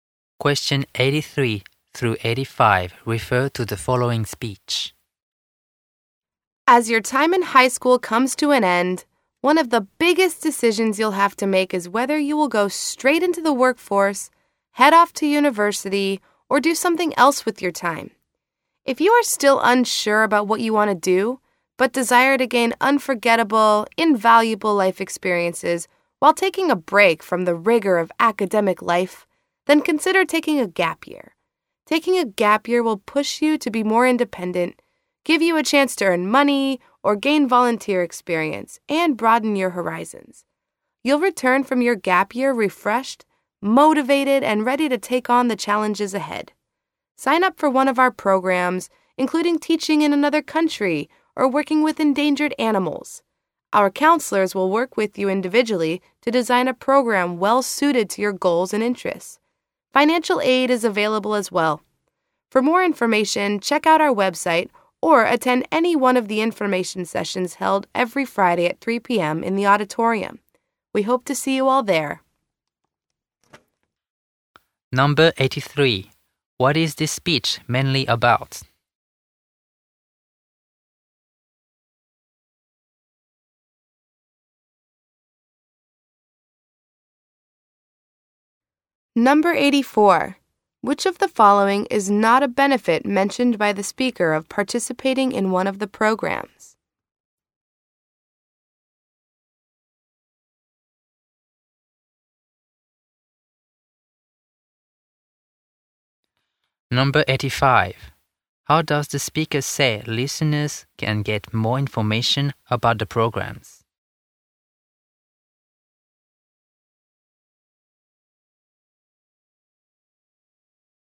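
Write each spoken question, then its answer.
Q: What is this speech mainly about?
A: Taking a gap year

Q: How does the speaker say listeners can get more information about the programs?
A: By checking the website or going to an information session on Friday at 3 p.m.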